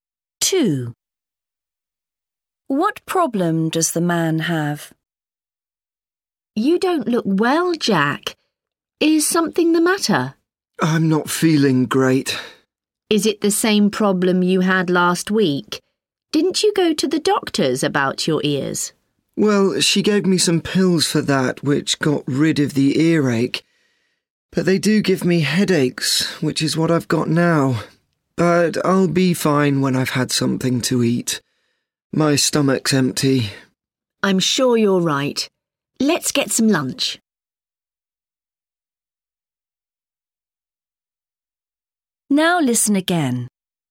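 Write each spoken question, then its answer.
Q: What problem does the man have?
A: A headache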